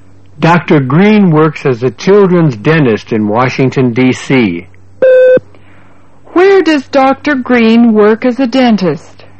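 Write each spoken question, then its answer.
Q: Where does Dr. Green work as a dentist?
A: In Washington, D.C.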